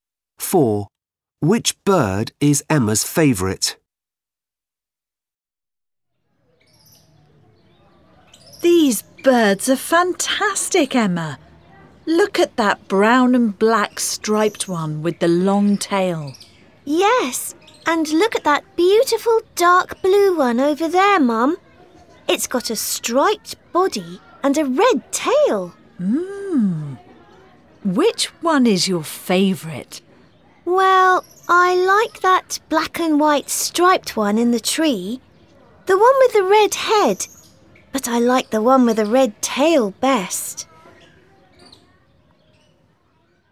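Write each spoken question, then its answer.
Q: Which bird is Emma's favourite?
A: the dark blue one with a striped body and a red tail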